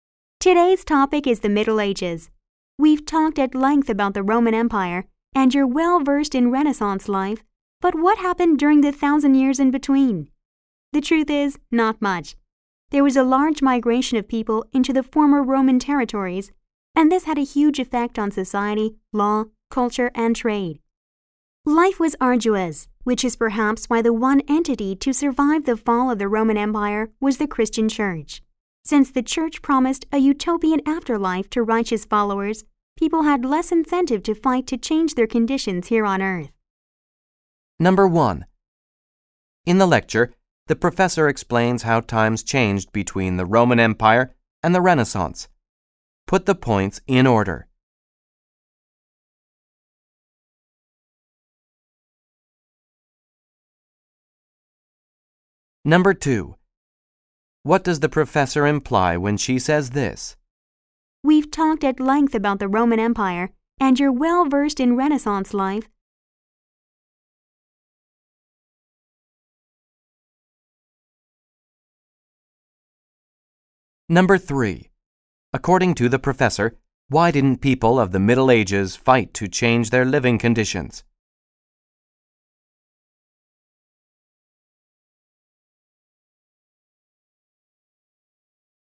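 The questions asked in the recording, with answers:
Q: According to the professor, why didn't people of the Middle Ages fight to change their living conditions?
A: Because the Church promised a utopian afterlife to righteous followers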